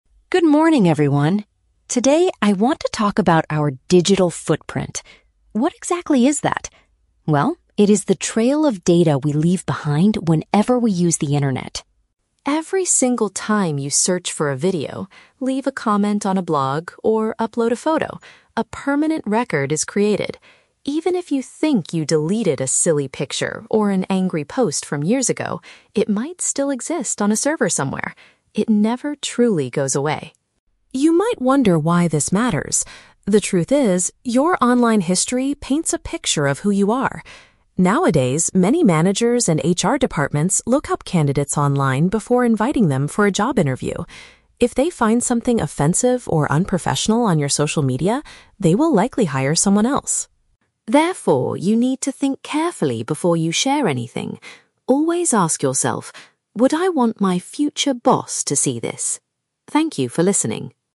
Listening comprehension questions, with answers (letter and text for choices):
Listen to the student giving a short presentation and choose the correct answer (A, B, or C) for each question.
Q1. What does the speaker say about photos or comments that you delete?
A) They are quickly replaced by your new search history.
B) They can frequently still be found stored on the internet.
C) They are completely erased from your digital footprint.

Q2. According to the presentation, why do companies research applicants online?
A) To check if the person has strong computer and typing skills.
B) To see if the candidate has uploaded their resume correctly.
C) To get a better idea of the applicant's true personality.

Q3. What final advice does the student give to the audience?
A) Consider how a potential employer might view your internet activity.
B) Delete all of your old and embarrassing photos immediately.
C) Ask your current manager to review your social media profiles.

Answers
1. B) They can frequently still be found stored on the internet.
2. C) To get a better idea of the applicant's true personality.
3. A) Consider how a potential employer might view your internet activity.

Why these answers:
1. The speaker says that even if you delete a picture or post, "it might still exist on a server somewhere." Option B paraphrases this as "found stored on the internet." Why the traps are wrong: Option A is a trap because the audio mentions "search" and "history", but it never says new searches replace old deleted items. Option C is incorrect because the speaker explicitly states that deleted content "never truly goes away."
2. The speaker mentions that companies look up candidates because your online history "paints a picture of who you are." Option C uses the synonym phrase "get a better idea of the applicant's true personality." Why the traps are wrong: Option A and Option B are traps. They are plausible reasons a company might use the internet, but the speaker never mentions testing computer skills or checking resumes in this presentation.
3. At the end, the student advises the audience to ask themselves, "Would I want my future boss to see this?" before sharing. Option A paraphrases this advice. Why the traps are wrong: Option B is a trap; the speaker talks about silly pictures, but he already explained that deleting them doesn't really work. His advice is about thinking before you post. Option C is a trap because it uses the word "manager/boss", but the advice is to ask yourself, not to ask your current manager to check your profile.

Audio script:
Student: Good morning, everyone. Today, I want to talk about our "digital footprint." What exactly is that? Well, it is the trail of data we leave behind whenever we use the internet.
Every single time you search for a video, leave a comment on a blog, or upload a photo, a permanent record is created. Even if you think you deleted a silly picture or an angry post from years ago, it might still exist on a server somewhere. It never truly goes away.
You might wonder why this matters. The truth is, your online history paints a picture of who you are. Nowadays, many managers and HR departments look up candidates online before inviting them for a job interview. If they find something offensive or unprofessional on your social media, they will likely hire someone else.
Therefore, you need to think carefully before you share anything. Always ask yourself: "Would I want my future boss to see this?" Thank you for listening.